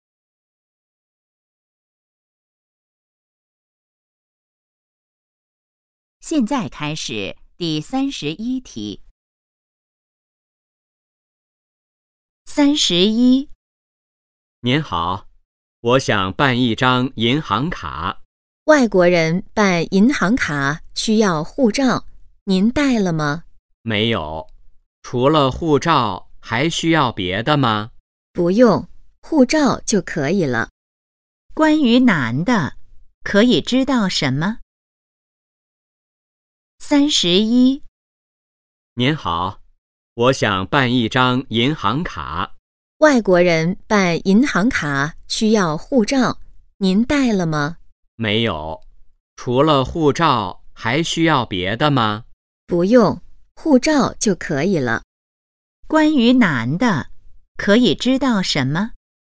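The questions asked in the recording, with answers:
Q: 关于男的,可以知道什么?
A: 他没带护照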